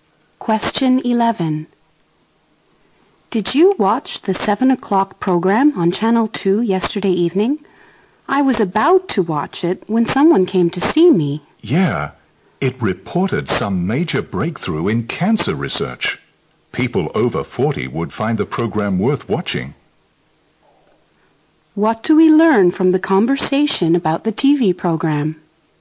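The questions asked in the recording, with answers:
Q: What do we learn from the conversation about the TV program?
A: It reported a major breakthrough in cancer research.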